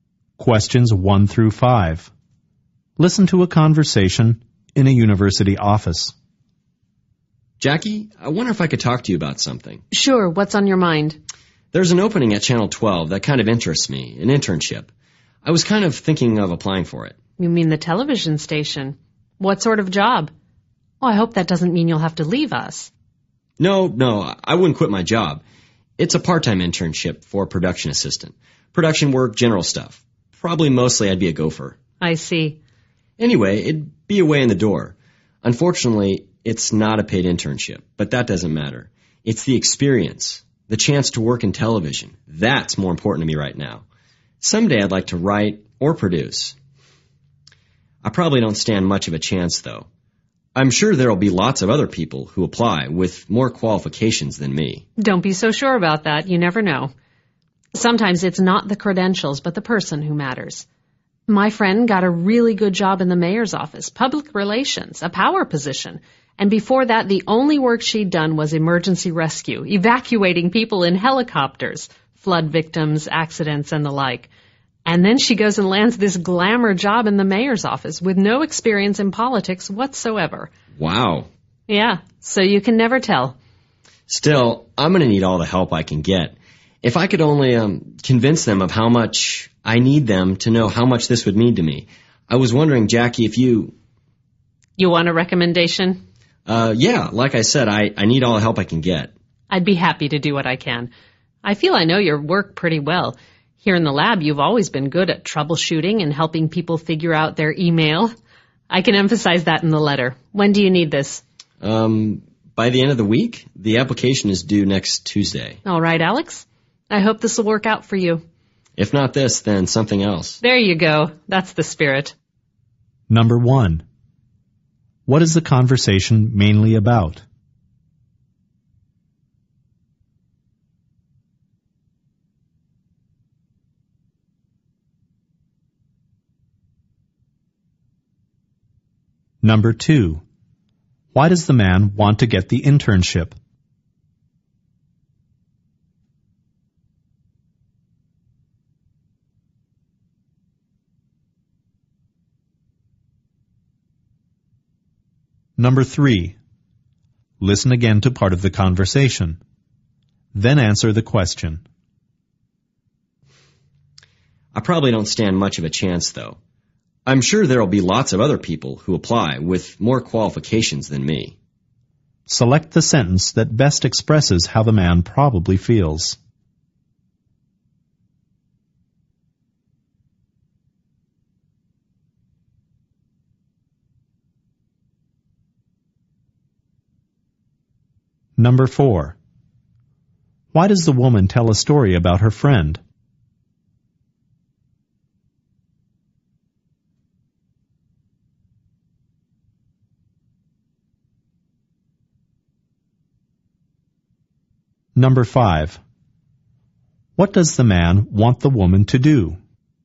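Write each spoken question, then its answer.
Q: What is the conversation mainly about?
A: The man asking for a recommendation for a TV internship

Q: Why does the man want to get the internship?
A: To gain experience working in television

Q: Select the sentence that best expresses how the man probably feels.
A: He doubts he will get the internship

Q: Why does the woman tell a story about her friend?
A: To show that he could get the job even without much experience

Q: What does the man want the woman to do?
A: Write him a letter of recommendation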